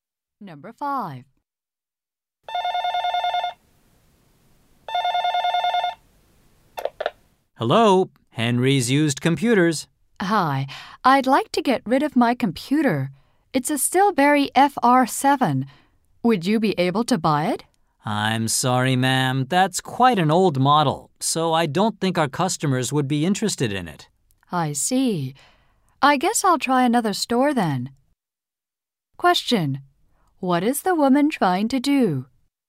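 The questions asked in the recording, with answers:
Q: What is the woman trying to do?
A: Sell her old computer.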